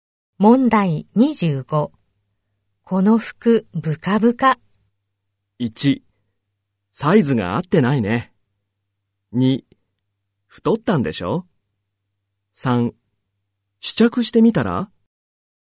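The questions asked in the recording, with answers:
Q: この服、ブカブカ。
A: 1: サイズが合ってないね。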